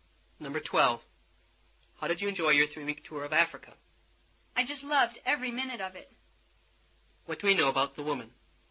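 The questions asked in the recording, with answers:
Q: What do we know about the woman?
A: She really enjoyed her tour of Africa.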